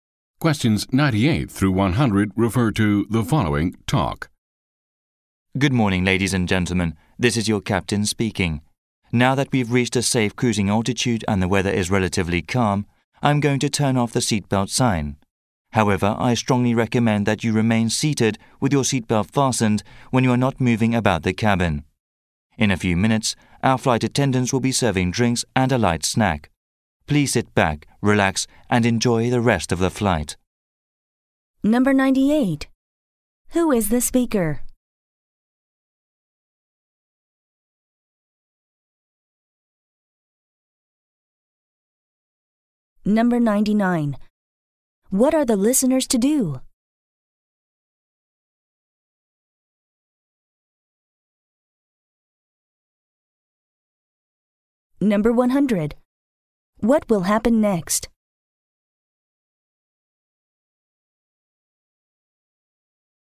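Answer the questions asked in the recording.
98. The pilot (captain)
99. Stay seated with seatbelts fastened
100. Drinks and a light snack will be served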